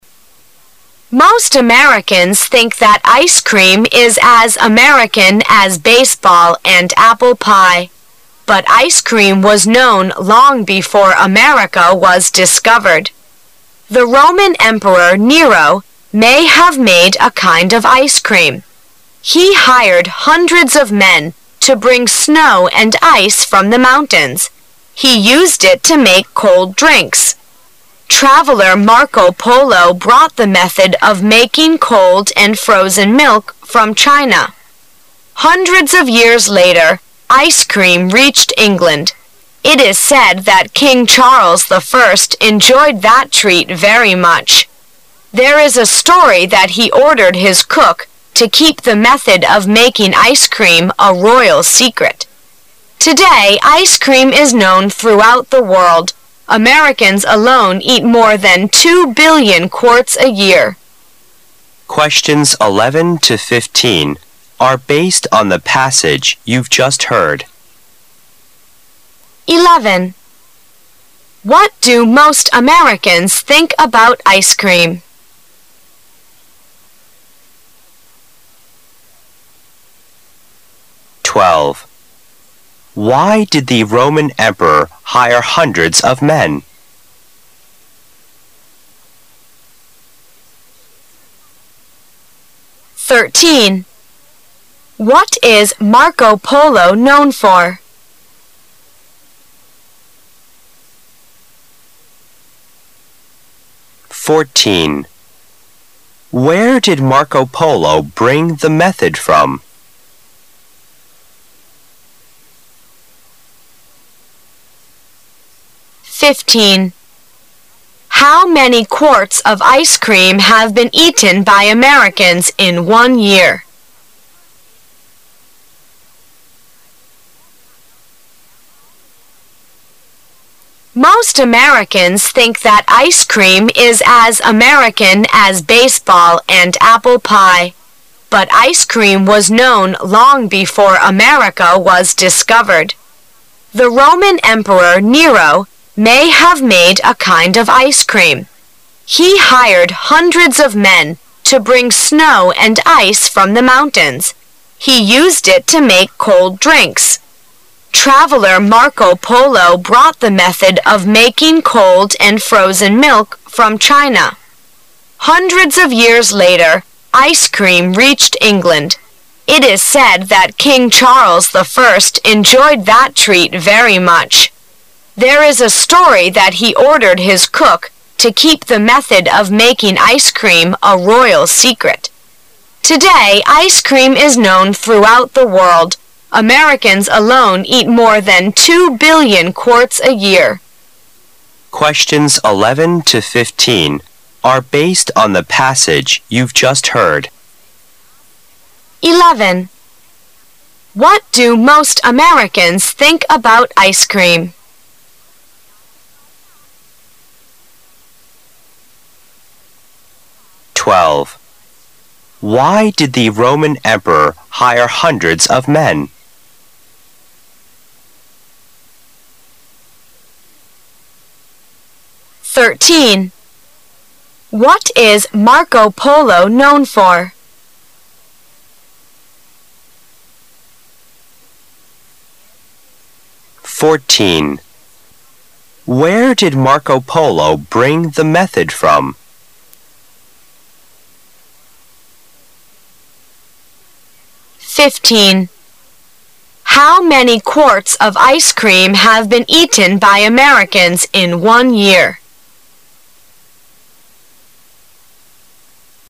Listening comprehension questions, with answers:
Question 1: What do most Americans think about ice cream? They consider that ice cream is ______ baseball and apple pie.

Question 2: Why did the Roman emperor hire hundreds of men? Because he hired them to bring ______ from the mountains.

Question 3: What is Marco Polo known for? Marco Polo is known for bringing the method of ______.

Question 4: Where did Marco Polo bring the method from? Marco Polo brought the method from______.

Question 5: How many quarts of ice cream have been eaten by Americans 'in one year? The Americans eat more than ______quarts of ice cream in a year.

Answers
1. as American as
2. snow and ice
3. making cold milk
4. China
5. two billion

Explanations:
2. 由问题和答案的其他部分可知这里需要填人名词。听力原文中第二段开始介绍冰激凌的历史,根据The Roman emperor Nero may have made a kind of ice cream.He hired hundred so of men to bring snow and ice from the mountains.可以写出答案。
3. 由问题和答案的其他部分可知这里需要填人动名词形式。根据Traveler Marco Polo brought the method of making cold and frozen milk from China,可以写出答案。
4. 由问题和答案的其他部分可知这里需要填人地点状语。根据Traveler Marco Polo brought the method Of making cold and frozen milk from China.可以写出答案。
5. 由问题和答案的其他部分可知这里需要填人数词。听的时候,根据问题和答案要格外重视数字部分的内容,根据Americans alone eat more than two billion quarts a year。可以写出答案。

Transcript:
[解析] 11-15 Most Americans think that ice cream is as American as baseball and apple pie. But ice cream was known long before America was discovered. The Roman emperor Nero may have made a kind of ice cream. He hired hundreds of men to bring snow and ice from the mountains. He used it to make cold drinks. Traveler Marco Polo brought the method of making cold and frozen milk from China. Hundreds of years later, ice cream reached England. It is said that King Charles I enjoyed that treat very much. There is a story that he ordered his cook to keep the method of making ice cream a royal secret. Today ice cream is known throughout the world. Americans alone eat more than two billion quarts a year.